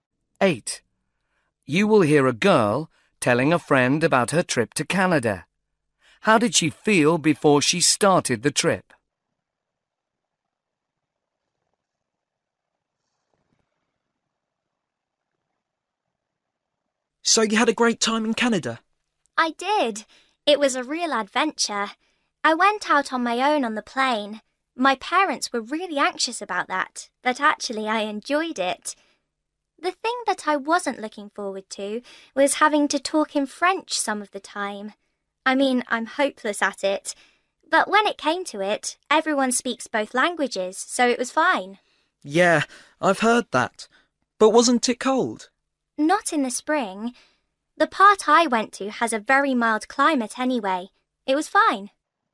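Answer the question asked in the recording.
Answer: Worried about having to speak French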